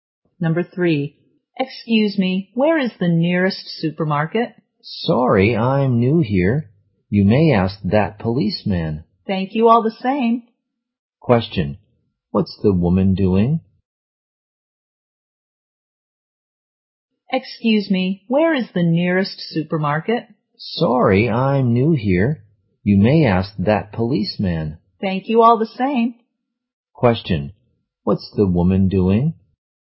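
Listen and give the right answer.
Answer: Asking the way to the nearest supermarket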